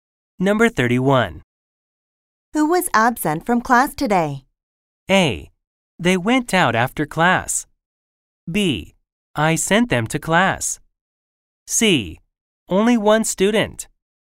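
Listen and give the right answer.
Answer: C: Only one student.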